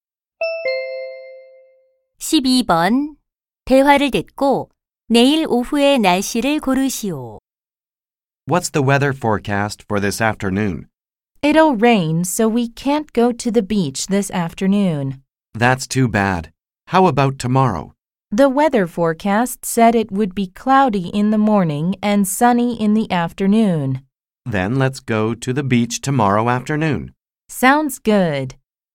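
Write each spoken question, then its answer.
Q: 대화를 듣고 내일 오후의 날씨를 고르시오.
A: 맑음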